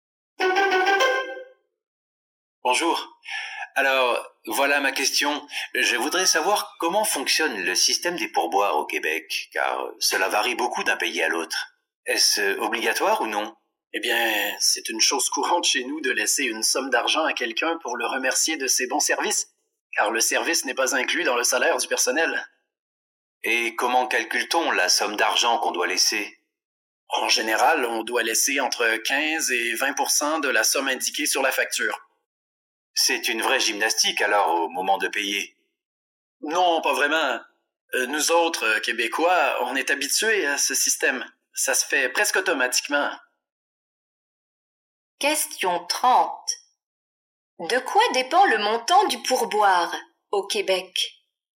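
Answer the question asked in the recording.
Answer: Du montant de la facture (15 à 20 %)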